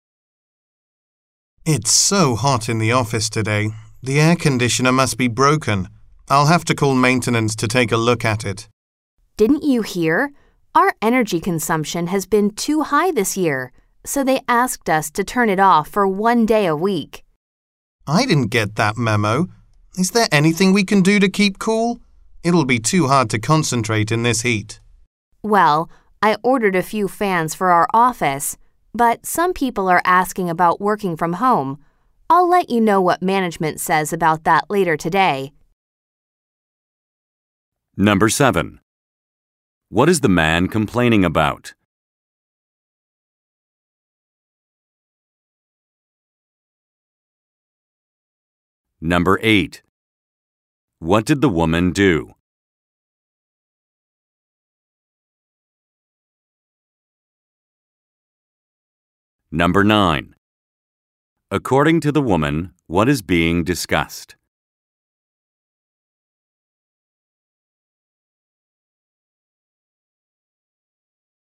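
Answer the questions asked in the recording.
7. The office is too hot
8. She ordered some fans for the office
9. Letting employees work from home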